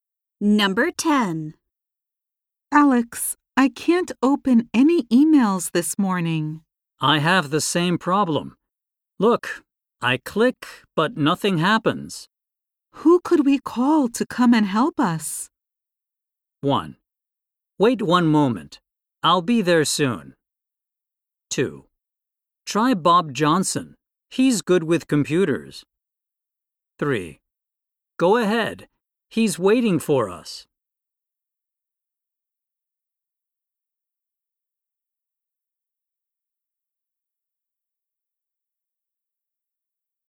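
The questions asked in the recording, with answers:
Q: Who could we call to come and help us?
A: 2: Try Bob Johnson. He's good with computers.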